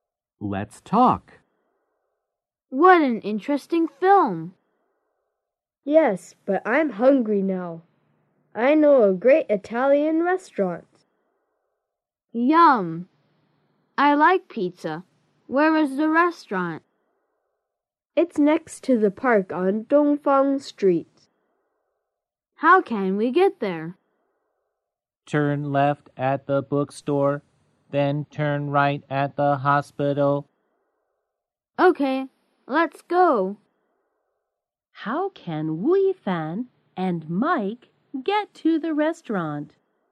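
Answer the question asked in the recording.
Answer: Turn left at the bookstore, then turn right at the hospital.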